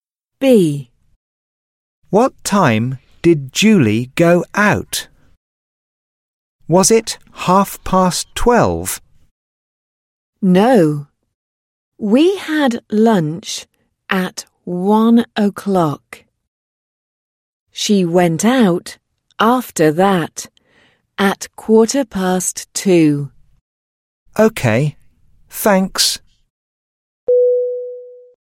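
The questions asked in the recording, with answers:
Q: What time did Julie go out?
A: 2:15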